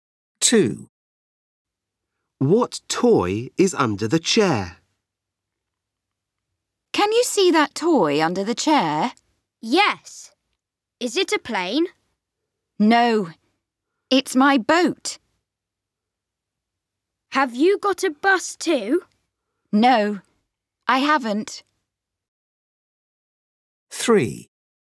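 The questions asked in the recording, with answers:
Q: What toy is under the chair?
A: A boat.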